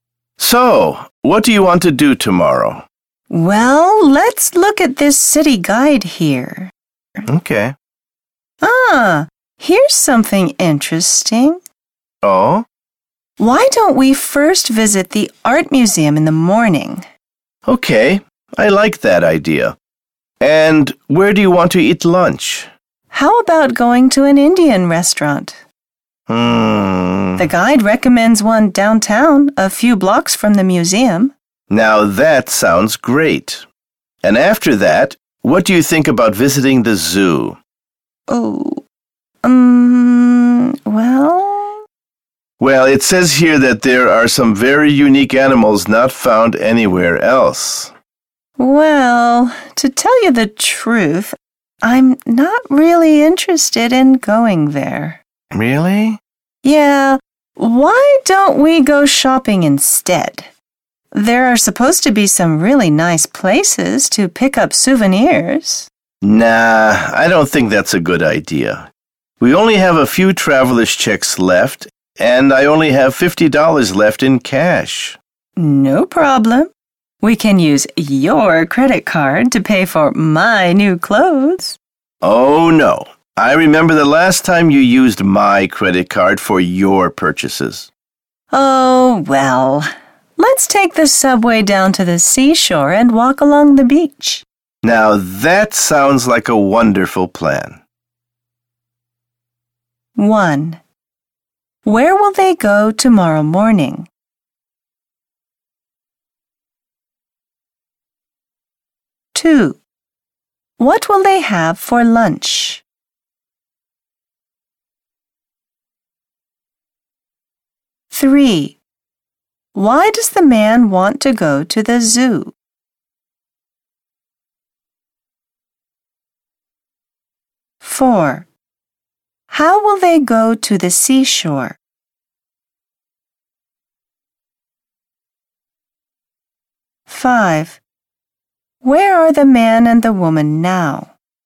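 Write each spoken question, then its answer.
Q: Where will they go tomorrow morning?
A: To the art museum

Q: What will they have for lunch?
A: Indian food

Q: Why does the man want to go to the zoo?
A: It has unique animals not found anywhere else

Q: How will they go to the seashore?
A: By subway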